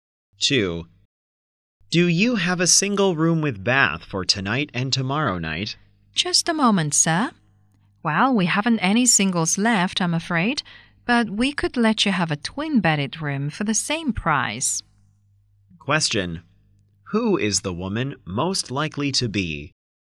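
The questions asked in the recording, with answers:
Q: Who is the woman most likely to be?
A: A hotel receptionist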